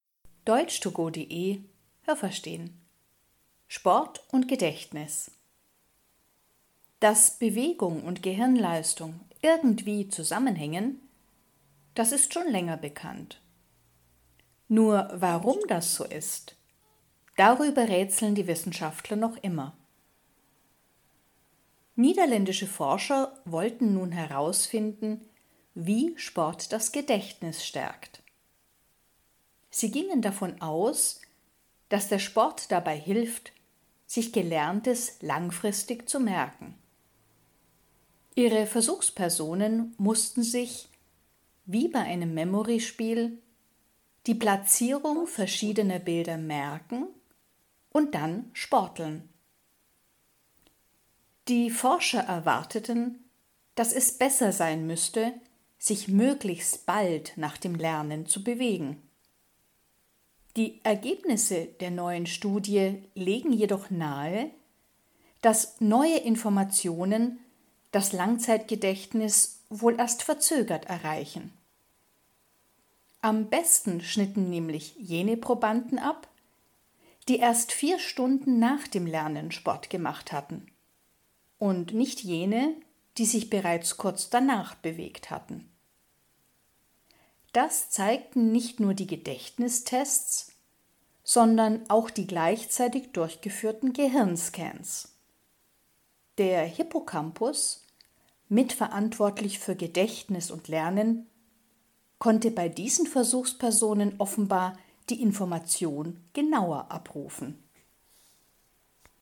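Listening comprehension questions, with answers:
Haben Sie das gehört? Stimmt diese Aussage?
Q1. Man weiß schon lange, warum Bewegung und Gehirnleistung zusammenhängen.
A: Nein, das habe ich nicht gehört.

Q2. Wissenschaftler aus den Niederlanden wollten in einer Studie herausfinden, wie Sport das Gedächtnis stärkt.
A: Ja, das habe ich gehört.

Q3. Die Probanden mussten sich merken, wo bestimmte Bilder lagen und dann Sport treiben.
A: Ja, das habe ich gehört.

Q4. Die Forscher haben zu Beginn der Studie gedacht, dass es am besten ist, sich gleich nach dem Lernen zu bewegen.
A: Ja, das habe ich gehört.

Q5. Bei dem Experiment schnitten auch wirklich die Versuchspersonen besser ab, die sich kurz nach dem Lernen bewegten.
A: Nein, das habe ich nicht gehört.

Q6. Man hat nicht nur Gedächtnistests durchgeführt, sondern auch Gehirnscans.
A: Ja, das habe ich gehört.

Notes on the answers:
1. Es ist bekannt, dass Bewegung und Gehirnleistung zusammenhängen, aber man weiß nicht warum.
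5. Es waren diejenigen Probanden besser, die erst 4 Stunden nach dem Lernen Sport machten.

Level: B2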